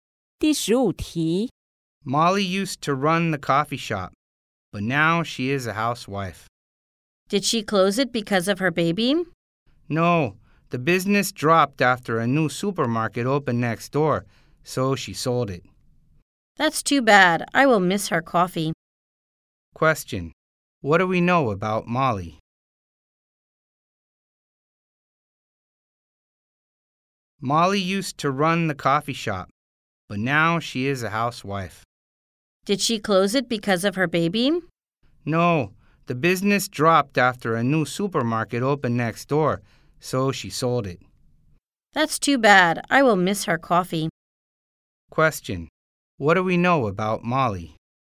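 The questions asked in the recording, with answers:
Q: Question. What do we know about Molly?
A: She sold her coffee shop after business dropped when a supermarket opened next door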